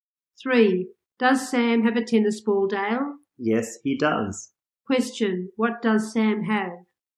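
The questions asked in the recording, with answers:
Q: What does Sam have?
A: A tennis ball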